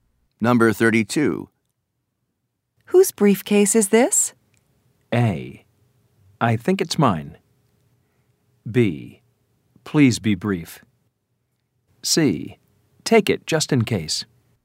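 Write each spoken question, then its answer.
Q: Whose briefcase is this?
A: A: I think it's mine.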